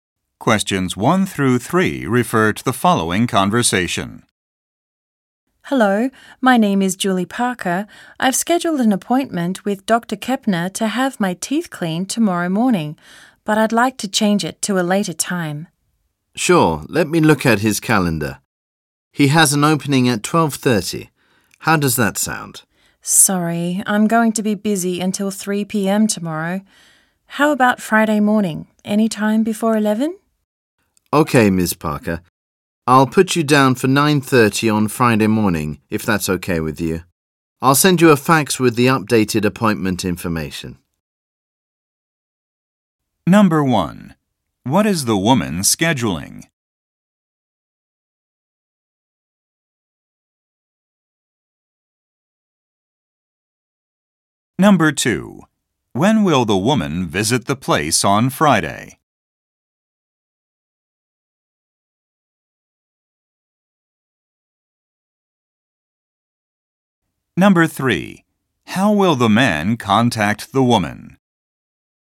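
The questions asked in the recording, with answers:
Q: What is the woman scheduling?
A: A dental appointment (teeth cleaning)

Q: When will the woman visit the place on Friday?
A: At 9:30

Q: How will the man contact the woman?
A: By fax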